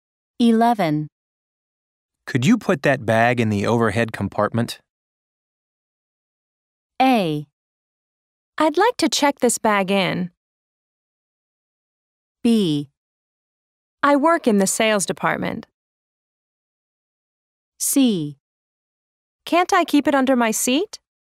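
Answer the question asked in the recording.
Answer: C: Can't I keep it under my seat?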